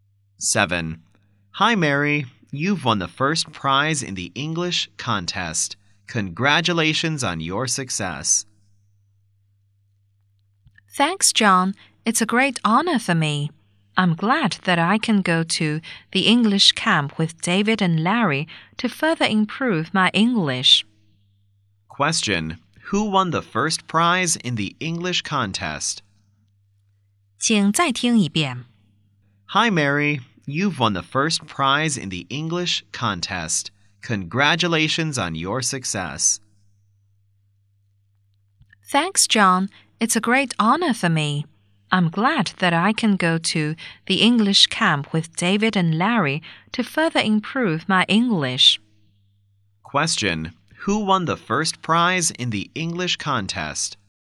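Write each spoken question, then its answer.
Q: Who won the first prize in the English contest?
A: Mary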